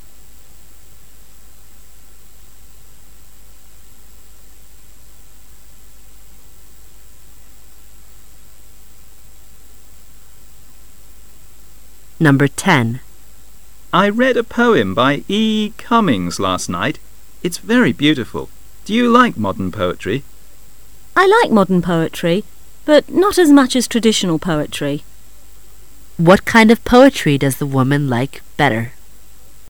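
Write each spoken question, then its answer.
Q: What kind of poetry does the woman like better?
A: Traditional poetry

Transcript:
[解析] M:I read a poem by E.E.Cummings last night.It's very beautiful,Do you like modern poetry? W:I like modern poetry,but not as much as traditional poetry. Q:What kind of poetry does the woman like better?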